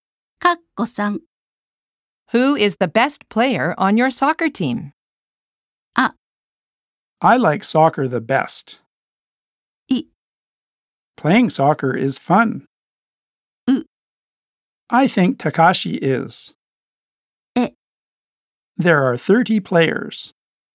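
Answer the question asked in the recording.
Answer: U: I think Takashi is.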